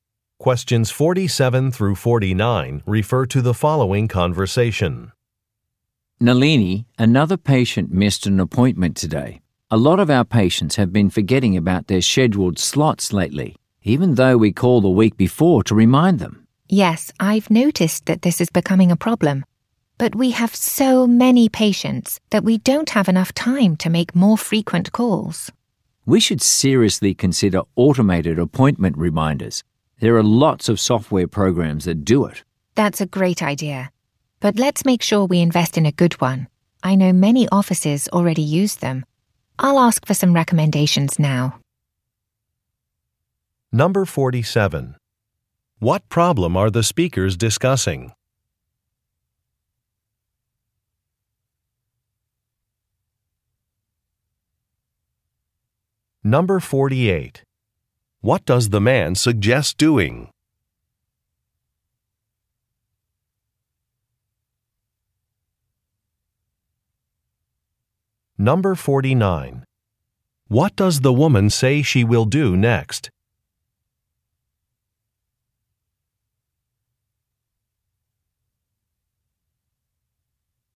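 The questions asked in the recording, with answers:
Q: What problem are the speakers discussing?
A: Patients are missing their appointments

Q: What does the man suggest doing?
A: Using automated appointment reminders

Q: What does the woman say she will do next?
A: Ask for some software recommendations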